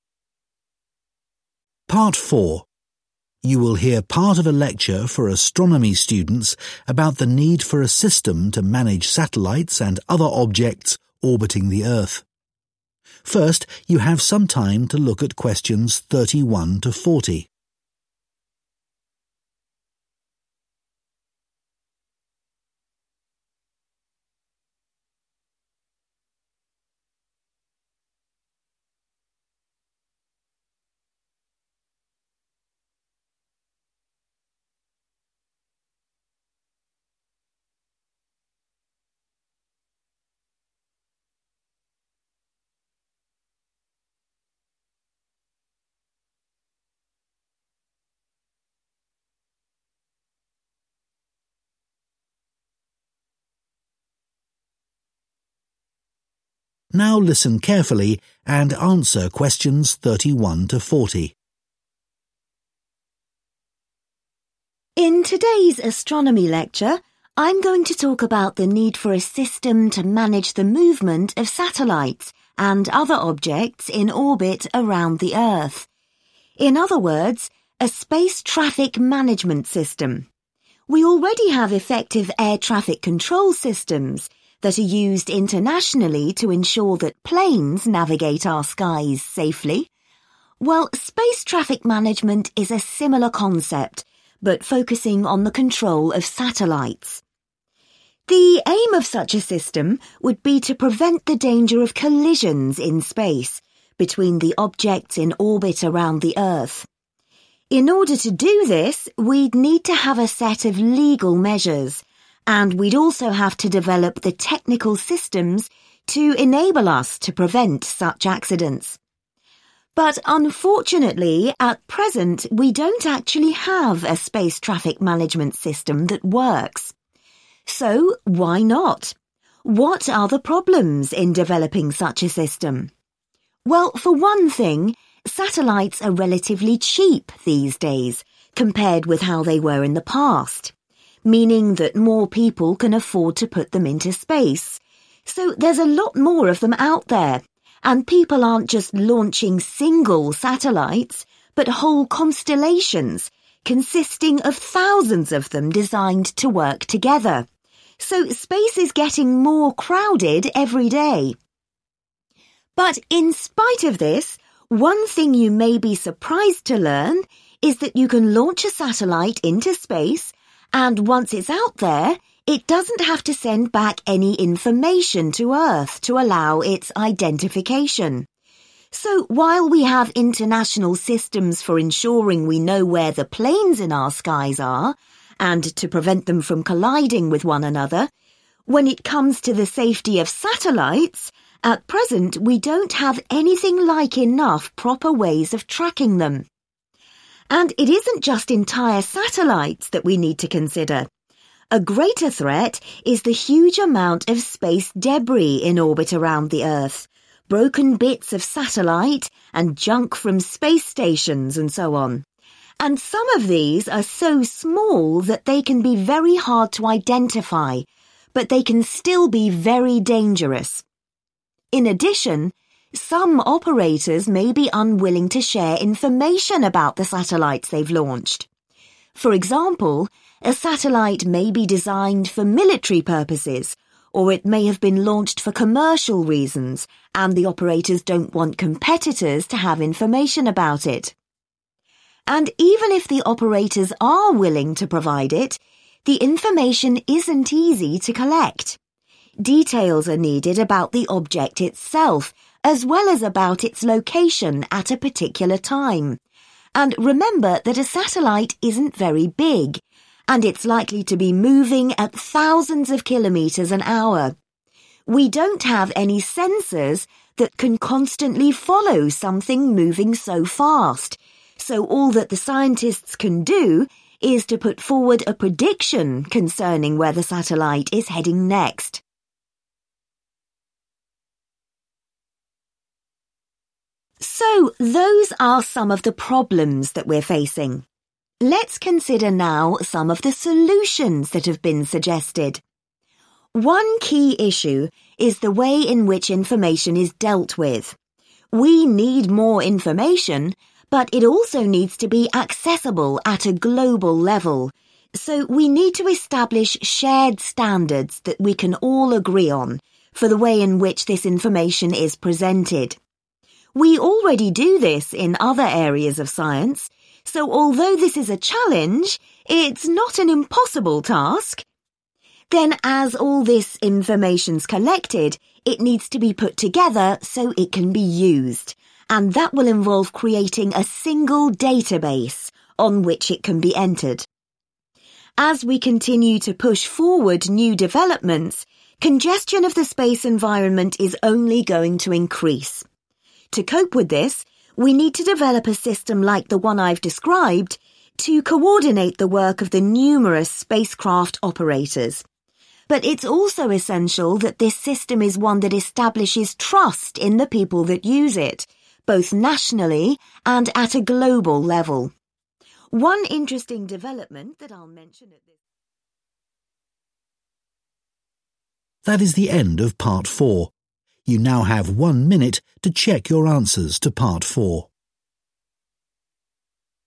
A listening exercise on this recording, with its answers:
Complete the notes below. Write ONE WORD ONLY for each answer.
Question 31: would aim to set up legal and (31) .......................... ways of improving safety.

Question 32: Satellites are now quite (32) .......................... and therefore more widespread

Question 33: (e.g. there are constellations made up of (33) .......................... of satellites).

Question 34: At present, satellites are not required to transmit information to help with their (34) ..........................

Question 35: There are few systems for (35) .......................... satellites.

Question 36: Operators may be unwilling to share details of satellites used for (36) .......................... or commercial reasons.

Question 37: It may be hard to collect details of the object's (37) .......................... at a given time.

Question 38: Scientists can only make a (38) .......................... about where the satellite will go.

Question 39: The information should be combined in one (39) ..........................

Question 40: A coordinated system must be designed to create (40) .......................... in its users.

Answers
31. Technical
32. Cheap
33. Thousands
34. Identification
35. Tracking
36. Military
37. Location
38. Prediction
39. Database
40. Trust